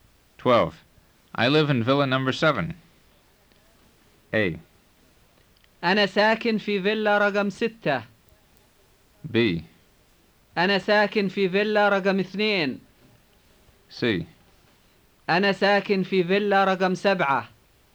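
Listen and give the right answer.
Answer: C: أنا ساكن في فيلا رقم 7.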